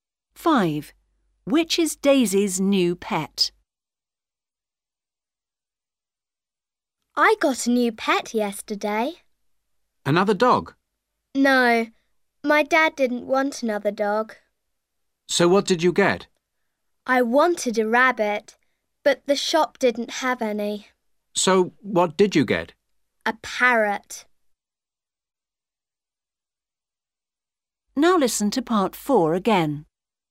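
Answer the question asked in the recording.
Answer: A parrot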